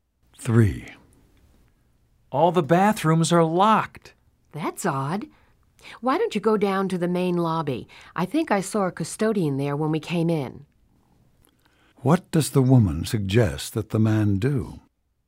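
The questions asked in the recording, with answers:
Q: What does the woman suggest that the man do?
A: Go to the main lobby and ask the custodian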